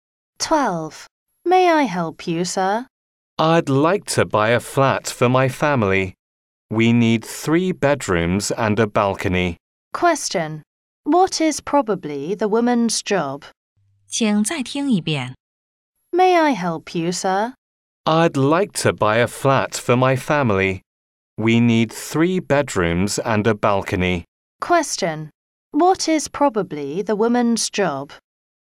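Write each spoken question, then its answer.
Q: What is probably the woman's job?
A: An estate agent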